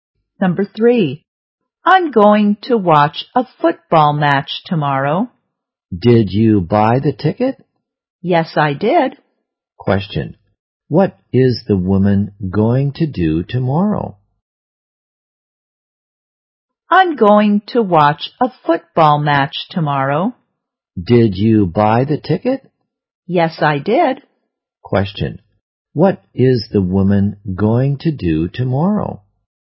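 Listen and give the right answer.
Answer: Watch a football match.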